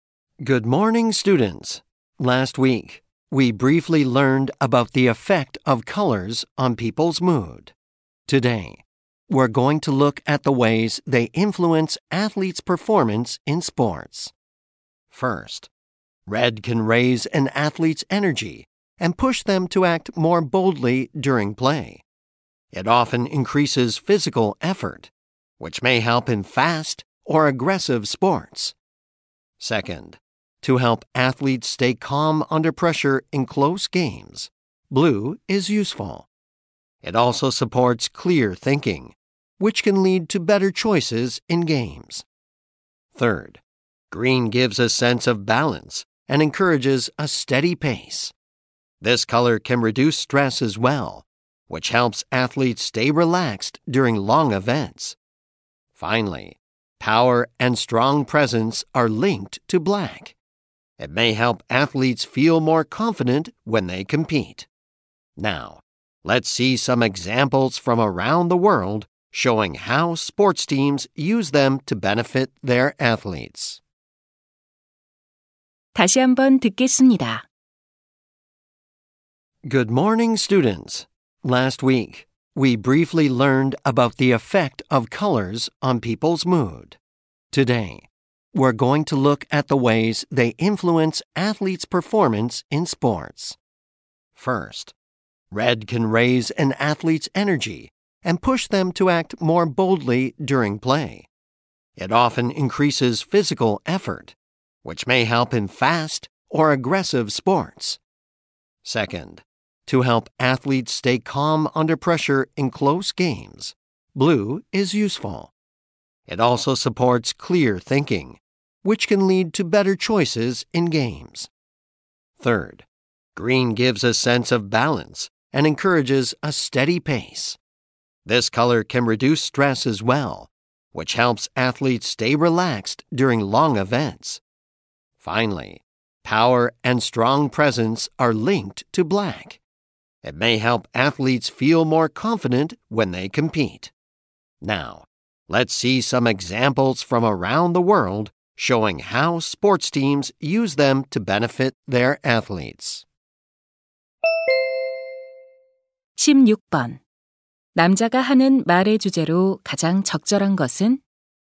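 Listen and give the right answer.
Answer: 색깔이 운동선수의 경기력에 미치는 영향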